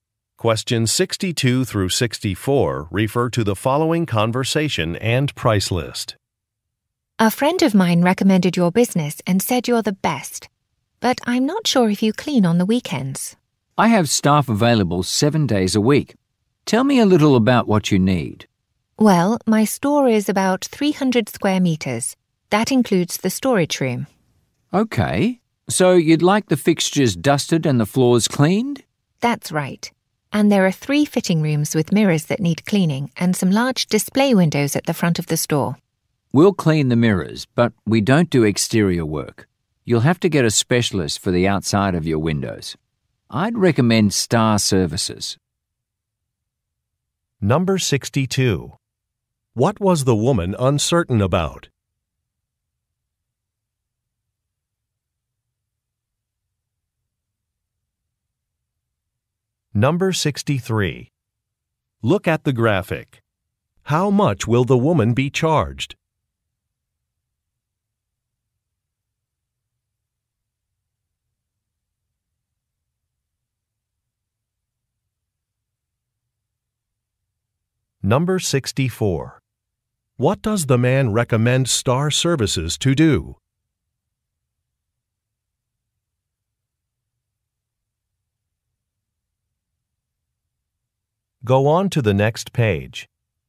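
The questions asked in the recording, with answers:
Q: What was the woman uncertain about?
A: Whether they clean on weekends

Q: What does the man recommend Star Services to do?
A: Clean the outside of the windows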